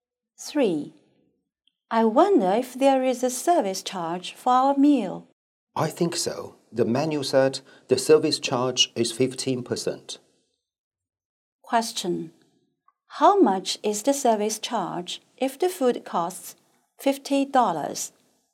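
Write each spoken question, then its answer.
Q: How much is the service charge if the food costs $50?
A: $7.50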